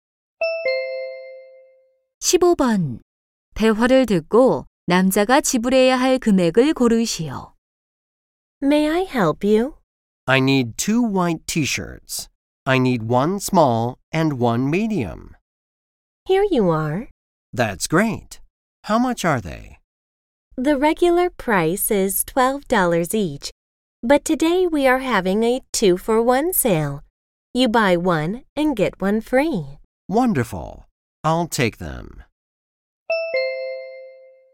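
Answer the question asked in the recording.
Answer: 12달러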